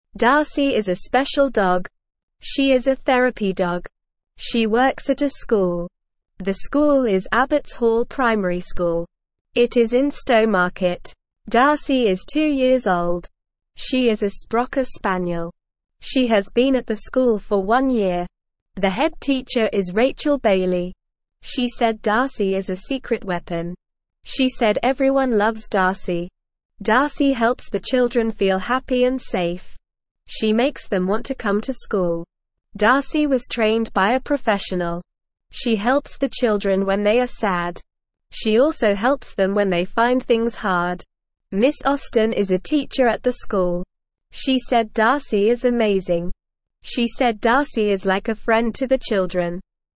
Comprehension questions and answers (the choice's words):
Listen and Fill in the Gaps:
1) She works at a (1)______.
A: school

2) It is in (2)______.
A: Stowmarket

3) She is a (3)______ spaniel.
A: sprocker

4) She said Darcy is a secret (4)______.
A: weapon

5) Darcy helps the children feel happy and (5)______.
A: safe

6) Darcy was trained by a (6)______.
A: professional

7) She said Darcy is like a (7)______ to the children.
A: friend

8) What is the head teacher's name?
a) Miss Austin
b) Rachel Bailey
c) Sarah Johnson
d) Emily Smith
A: Rachel Bailey

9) What does Darcy help the children feel?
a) scared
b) bored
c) happy and safe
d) tired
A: happy and safe

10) What does Miss Austin say about Darcy?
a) Darcy is lazy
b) Darcy is amazing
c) Darcy is too big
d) Darcy is noisy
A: Darcy is amazing

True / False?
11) Darcy is a cat.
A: False

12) Darcy works at a school.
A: True

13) The school is in Stowmarket.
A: True

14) Darcy is five years old.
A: False

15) The head teacher is Rachel Bailey.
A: True

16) Darcy makes the children feel scared.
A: False

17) Miss Austin is a teacher at the school.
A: True

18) Darcy is not a friend to the children.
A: False

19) What does the head teacher call Darcy?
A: The head teacher calls Darcy a secret weapon.

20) How does Darcy help the children?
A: Darcy helps the children feel happy, safe, and want to come to school.

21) What did Miss Austin say about Darcy?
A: Miss Austin said Darcy is amazing and like a friend to the children.

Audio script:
Darcy is a special dog. She is a therapy dog. She works at a school. The school is Abbotts Hall Primary School. It is in Stowmarket. Darcy is two years old. She is a sprocker spaniel. She has been at the school for one year. She said Darcy is a secret weapon. She said everyone loves Darcy.
Darcy helps the children feel happy and safe. She makes them want to come to school. Darcy was trained by a professional. She helps the children when they are sad. She also helps them when they find things hard. She said Darcy is like a friend to the children.

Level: Level 1